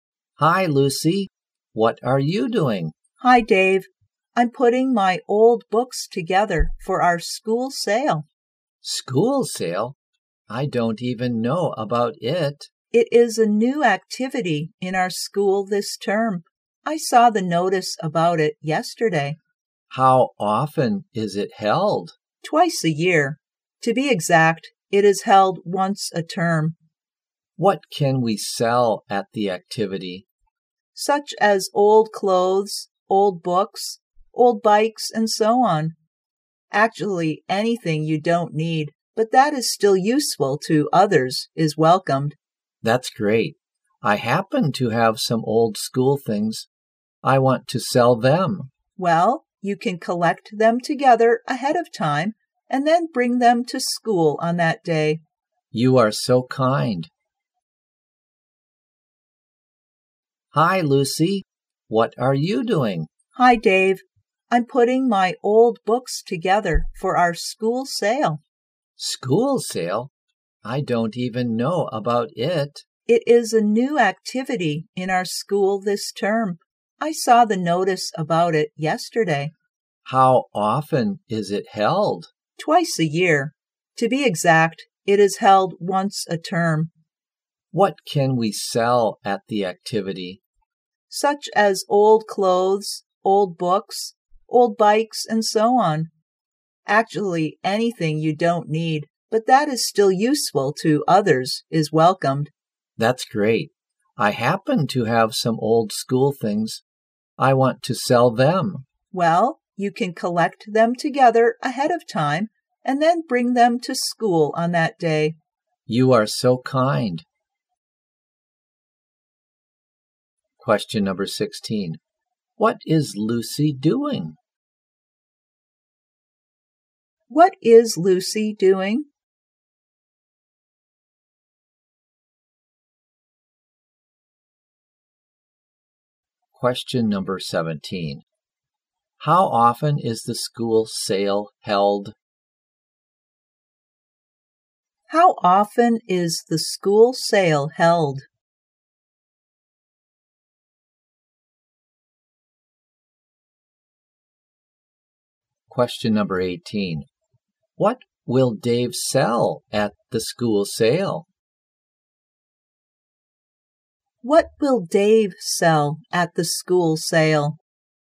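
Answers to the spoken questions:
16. Putting her old books together for the school sale
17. Once a term (twice a year)
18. Some old school things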